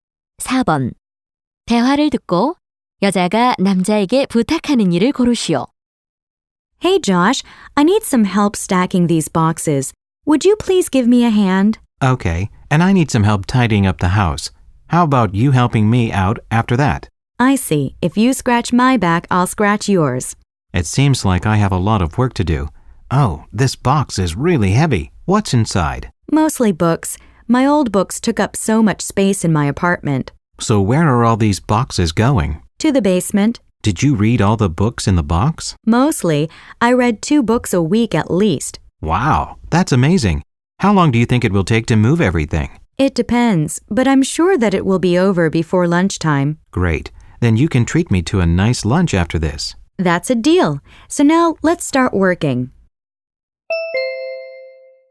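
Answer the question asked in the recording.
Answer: 상자 쌓는 것 돕기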